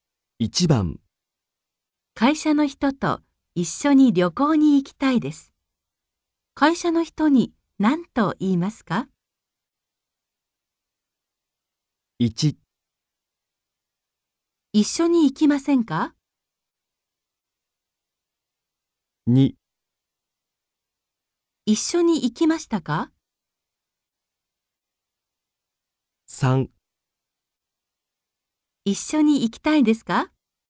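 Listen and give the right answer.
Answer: 1: 一緒に行きませんか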